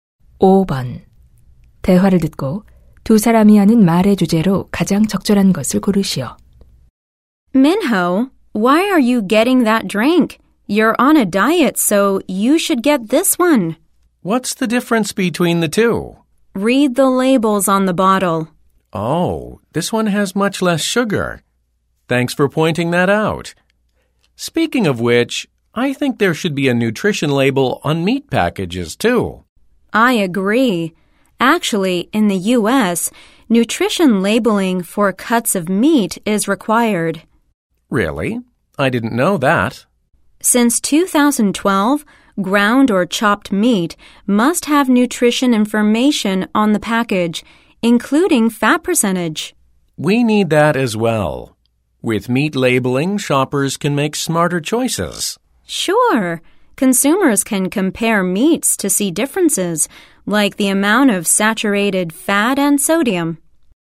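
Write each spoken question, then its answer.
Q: 대화를 듣고 두 사람이 하는 말의 주제로 가장 적절한 것을 고르시오.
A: 육류 포장에 영양 성분 표시의 필요성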